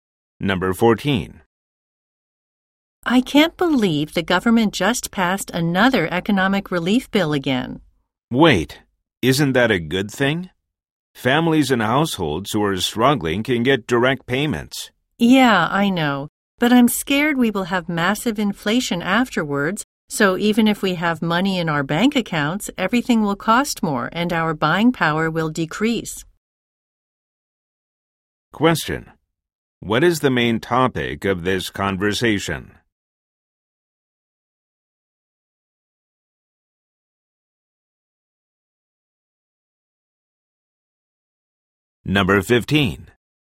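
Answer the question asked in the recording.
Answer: A new economic relief bill and fears of inflation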